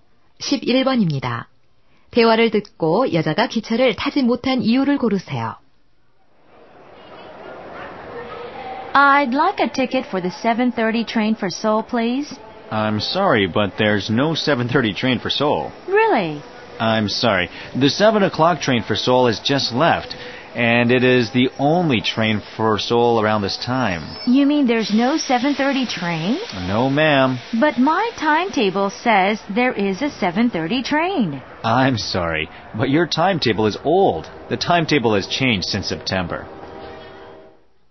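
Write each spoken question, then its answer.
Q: 대화를 듣고 여자가 기차를 타지 못한 이유를 고르세요.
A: 시간표가 오래되어서(바뀐 시간표를 몰라서)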